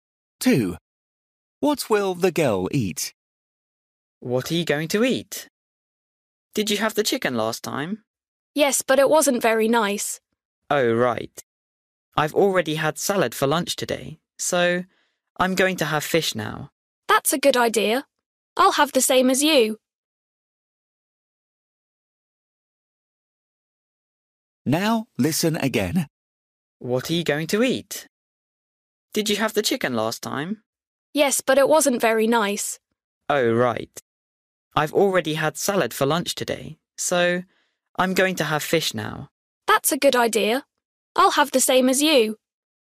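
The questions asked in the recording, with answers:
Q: What will the girl eat?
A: Fish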